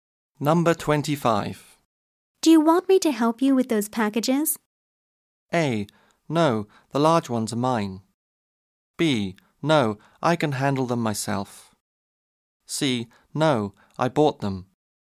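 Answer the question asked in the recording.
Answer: B: No, I can handle them myself.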